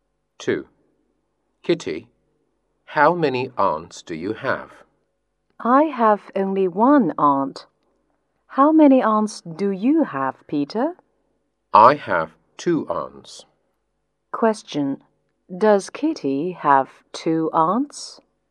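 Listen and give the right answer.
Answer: No, she has only one aunt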